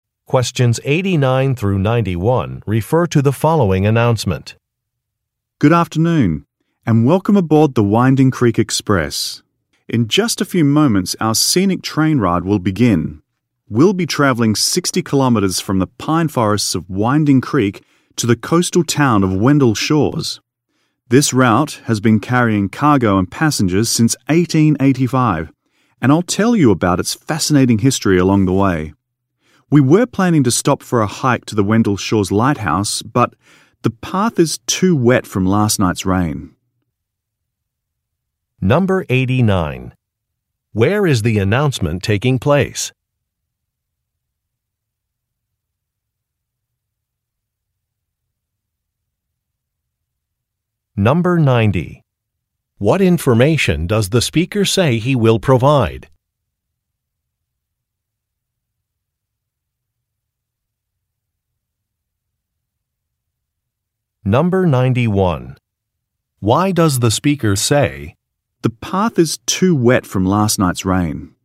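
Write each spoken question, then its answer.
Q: Where is the announcement taking place?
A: On a train (the Winding Creek Express)

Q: What information does the speaker say he will provide?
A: The history of the train route

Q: Why does the speaker say, "The path is too wet from last night's rain"?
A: To explain that the planned hike to the lighthouse is canceled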